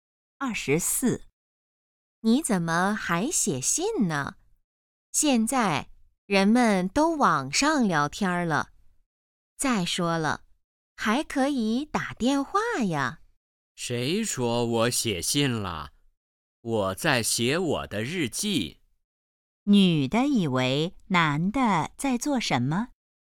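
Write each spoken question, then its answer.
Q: 女的以为男的在做什么?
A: 写信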